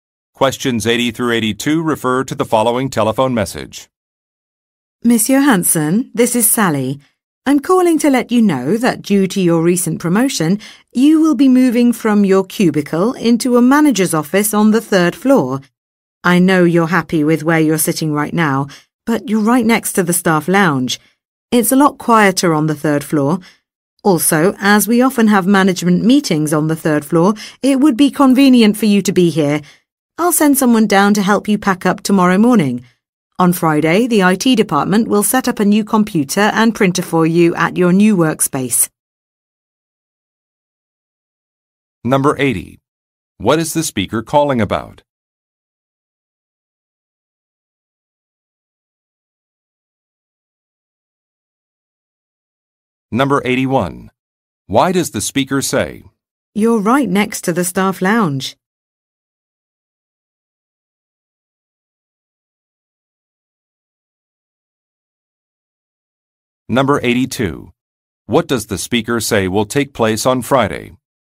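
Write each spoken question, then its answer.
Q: What is the speaker calling about?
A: The listener is moving to a manager's office on the third floor after his promotion

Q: Why does the speaker say, "You're right next to the staff lounge"?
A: To say that his current spot is noisy

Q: What does the speaker say will take place on Friday?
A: The IT department will set up a new computer and printer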